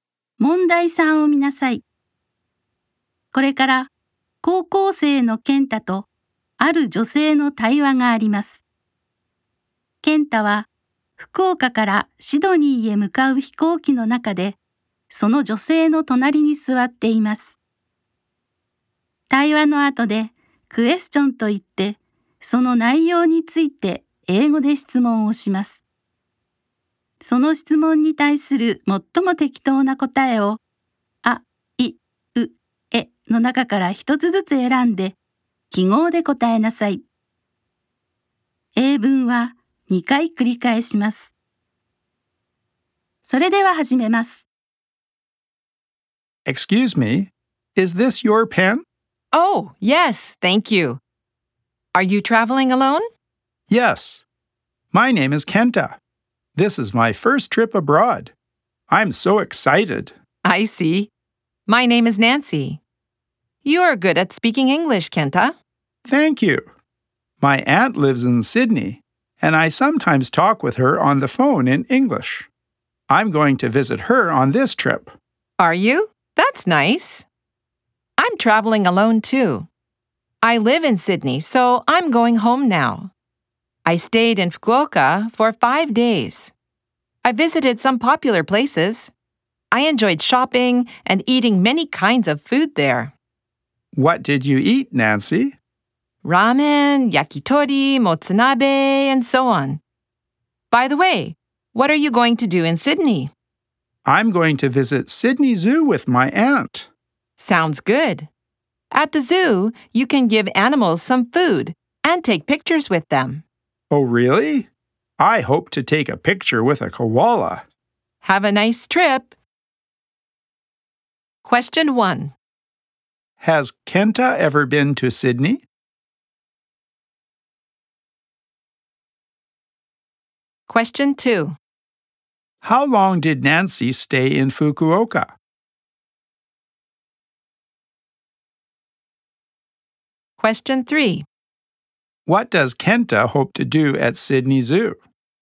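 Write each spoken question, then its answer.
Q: Has Kenta ever been to Sydney?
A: No, he hasn't (it is his first trip abroad).

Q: How long did Nancy stay in Fukuoka?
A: For 5 days.

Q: What does Kenta hope to do at Sydney Zoo?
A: Take a picture with a koala.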